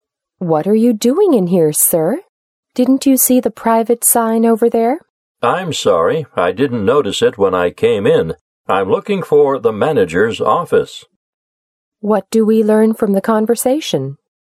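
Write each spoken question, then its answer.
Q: What do we learn from the conversation?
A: The man went into a private area by mistake; he is looking for the manager's office.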